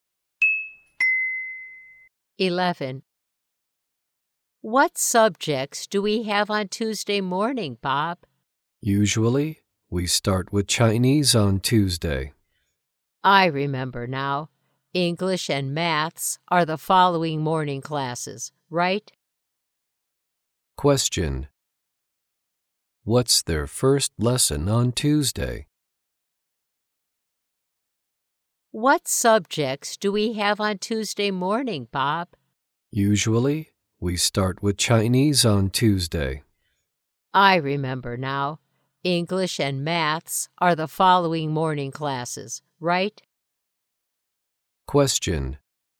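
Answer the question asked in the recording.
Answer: Chinese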